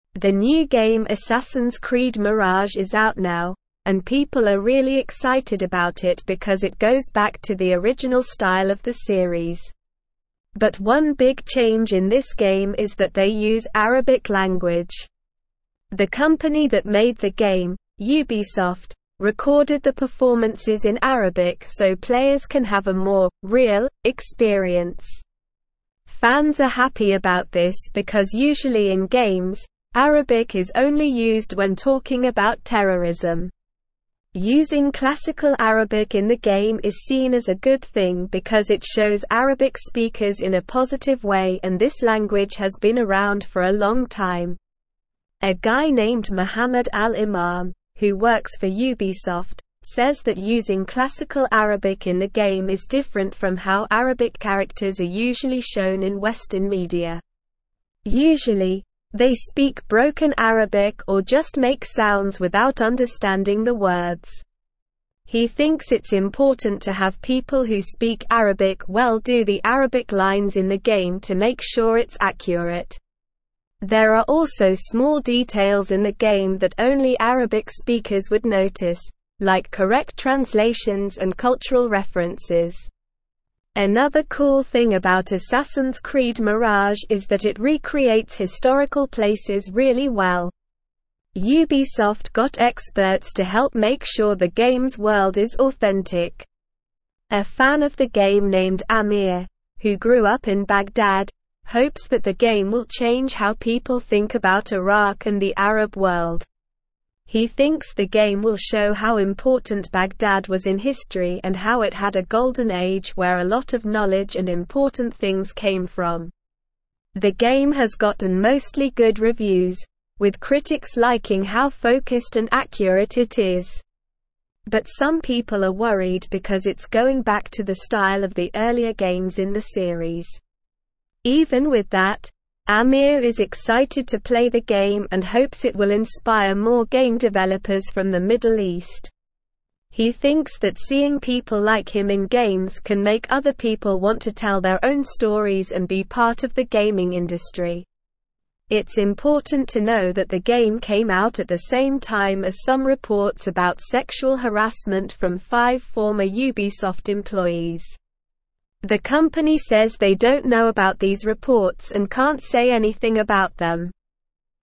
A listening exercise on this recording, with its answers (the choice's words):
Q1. What is the name of the new game that has been released?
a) Assassin's Creed Origins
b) Assassin's Creed Mirage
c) Assassin's Creed Odyssey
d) Assassin's Creed Valhalla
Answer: Assassin's Creed Mirage

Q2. Why are fans excited about Assassin's Creed Mirage?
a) It goes back to the original style of the series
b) It features new gameplay mechanics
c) It has a completely different storyline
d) It introduces a new language in the game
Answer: It goes back to the original style of the series

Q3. What language is used in Assassin's Creed Mirage?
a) French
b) Spanish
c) Arabic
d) German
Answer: Arabic

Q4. Why is the use of Arabic in the game seen as a positive thing?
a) It adds an element of realism to the game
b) It helps players learn a new language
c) It promotes cultural diversity in the gaming industry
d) It shows Arabic speakers in a positive way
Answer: It shows Arabic speakers in a positive way

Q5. What is one small detail in the game that only Arabic speakers would notice?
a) Historical accuracy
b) Cultural references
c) Correct translations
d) Authentic world design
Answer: Correct translations

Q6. How did Ubisoft ensure the authenticity of the game's world?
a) They conducted extensive research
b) They got experts to help with the development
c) They visited historical sites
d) They consulted with local communities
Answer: They got experts to help with the development

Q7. What does Ameer hope the game will change?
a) The perception of gaming industry in the Middle East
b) The popularity of historical games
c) The portrayal of Arabic characters in Western media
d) How people think about Iraq and the Arab world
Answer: How people think about Iraq and the Arab world

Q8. What controversy is associated with the release of Assassin's Creed Mirage?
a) Reports of sexual harassment from former Ubisoft employees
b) Accusations of plagiarism against the game developers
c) Issues with the game's performance and bugs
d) Lack of diversity in the game's characters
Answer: Reports of sexual harassment from former Ubisoft employees

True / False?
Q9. Mohammed Al Imam, a Ubisoft employee, believes it is important to have Arabic speakers accurately portray the language in the game.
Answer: True

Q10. The game does not feature Arabic language, which is consistent with the usual portrayal of Arabic in video games.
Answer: False

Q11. Ubisoft, the company behind the game, did not record the performances in Arabic to provide a more authentic experience for players.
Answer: False

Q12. The new game Assassin's Creed Mirage has been released and is generating a lot of excitement among fans.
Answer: True

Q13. Assassin's Creed Mirage is criticized for its inaccurate recreation of historical places, despite the involvement of experts.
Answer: False

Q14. Arabic speakers are pleased with the game's use of classical Arabic, as it presents the language in a positive light and showcases its long history.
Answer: True

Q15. The game includes small details that only Arabic speakers would notice, such as correct translations and cultural references.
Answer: True

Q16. Fans like Ameer are not excited to play the game and do not have hopes that it will inspire more Middle Eastern game developers.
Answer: False

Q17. The new game Assassin's Creed (1)______ is out now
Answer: Mirage

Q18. it goes back to the (2)______ style of the series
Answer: original

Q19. because it (3)______ Arabic (4)______ in a positive way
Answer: shows

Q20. because it (3)______ Arabic (4)______ in a positive way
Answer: speakers

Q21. A guy (5)______ Mohammed Al Imam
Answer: named

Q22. to make sure it's (6)______.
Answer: accurate

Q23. like (7)______ translations and cultural (8)______.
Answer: correct

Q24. like (7)______ translations and cultural (8)______.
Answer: references

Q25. Another cool (9)______ about Assassin's Creed Mirage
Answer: thing

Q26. it recreates (10)______ places really well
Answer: historical

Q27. The game has gotten mostly good (11)______, with critics liking how (12)______ and accurate it is.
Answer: reviews

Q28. The game has gotten mostly good (11)______, with critics liking how (12)______ and accurate it is.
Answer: focused

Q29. the style of the earlier games in the (13)______.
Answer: series

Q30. inspire more game (14)______ from the Middle East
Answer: developers

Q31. He thinks that seeing (15)______ like him in games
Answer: people

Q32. from five former Ubisoft (16)______.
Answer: employees

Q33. Why are people excited about the new game Assassin's Creed Mirage?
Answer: People are excited about the new game Assassin's Creed Mirage because it goes back to the original style of the series.

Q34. What is one big change in this game compared to previous games in the series?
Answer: One big change in this game is that they use Arabic language.

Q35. According to Mohammed Al Imam, why is it important to have people who speak Arabic well do the Arabic lines in the game?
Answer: According to Mohammed Al Imam, it is important to have people who speak Arabic well do the Arabic lines in the game to ensure accuracy and authenticity.

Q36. What are some small details in the game that only Arabic speakers would notice?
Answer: Some small details in the game that only Arabic speakers would notice are correct translations and cultural references.

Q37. How did Ubisoft ensure that the game's world is authentic?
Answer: Ubisoft ensured that the game's world is authentic by getting experts to help in its creation.

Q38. What does Ameer hope the game will change people's perception of?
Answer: Ameer hopes that the game will change people's perception of Iraq and the Arab world, showing how important Baghdad was in history and its golden age of knowledge and achievements.

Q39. What are some concerns that people have about the game, despite the mostly good reviews it has received?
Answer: Some concerns that people have about the game, despite the mostly good reviews it has received, are that it is going back to the style of the earlier games in the series.

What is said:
The new game Assassin's Creed Mirage is out now, and people are really excited about it because it goes back to the original style of the series. But one big change in this game is that they use Arabic language. The company that made the game, Ubisoft, recorded the performances in Arabic so players can have a more "real" experience. Fans are happy about this because usually in games, Arabic is only used when talking about terrorism. Using classical Arabic in the game is seen as a good thing because it shows Arabic speakers in a positive way and this language has been around for a long time.
A guy named Mohammed Al Imam, who works for Ubisoft, says that using classical Arabic in the game is different from how Arabic characters are usually shown in Western media. Usually, they speak broken Arabic or just make sounds without understanding the words. He thinks it's important to have people who speak Arabic well do the Arabic lines in the game to make sure it's accurate. There are also small details in the game that only Arabic speakers would notice, like correct translations and cultural references.
Another cool thing about Assassin's Creed Mirage is that it recreates historical places really well. Ubisoft got experts to help make sure the game's world is authentic. A fan of the game named Ameer, who grew up in Baghdad, hopes that the game will change how people think about Iraq and the Arab world. He thinks the game will show how important Baghdad was in history and how it had a golden age where a lot of knowledge and important things came from.
The game has gotten mostly good reviews, with critics liking how focused and accurate it is. But some people are worried because it's going back to the style of the earlier games in the series. Even with that, Ameer is excited to play the game and hopes it will inspire more game developers from the Middle East. He thinks that seeing people like him in games can make other people want to tell their own stories and be part of the gaming industry.
It's important to know that the game came out at the same time as some reports about sexual harassment from five former Ubisoft employees. The company says they don't know about these reports and can't say anything about them.

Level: Level 3